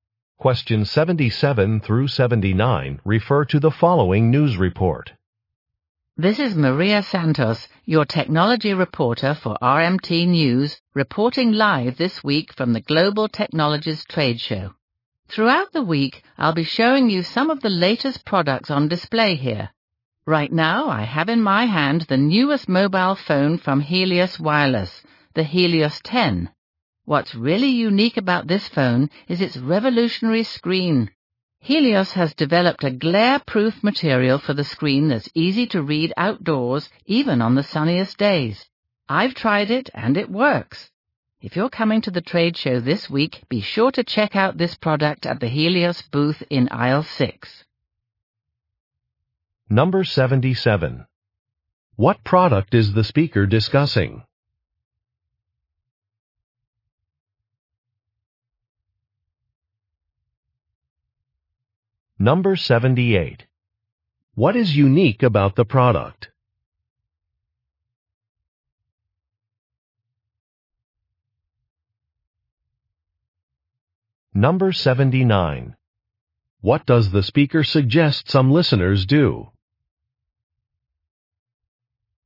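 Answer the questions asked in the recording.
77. A mobile phone
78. Its glare-proof screen that is easy to read outdoors
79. Visit the Helios booth at the trade show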